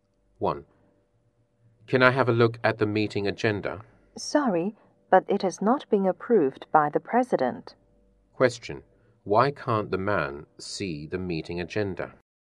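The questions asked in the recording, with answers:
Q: Why can't the man see the meeting agenda?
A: It has not been approved by the President yet.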